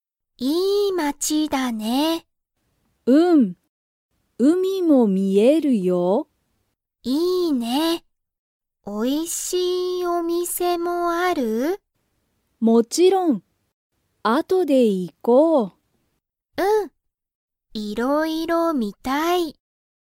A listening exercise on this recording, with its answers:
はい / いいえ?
この街(まち)は、おいしいお店(みせ)がありますか?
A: はい

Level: Level 1